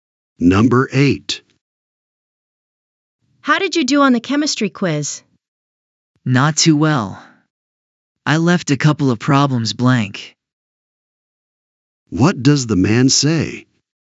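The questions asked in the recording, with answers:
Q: What does the man say?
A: He didn't do well; he left some problems blank.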